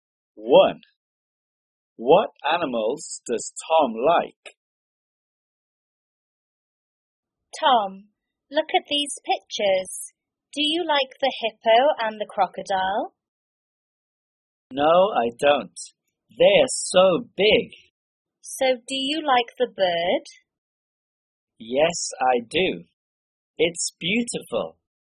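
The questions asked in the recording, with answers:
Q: What animals does Tom like?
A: the bird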